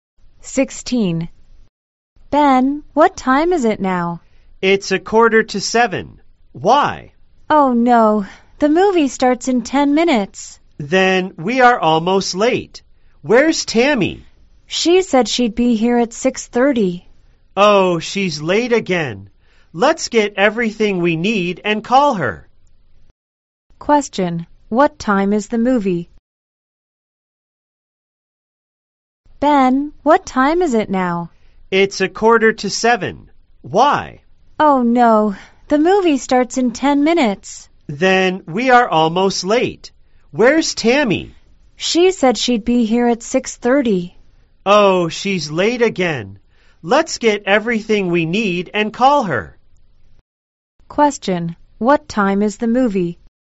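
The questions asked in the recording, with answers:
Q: What time is the movie?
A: 6:55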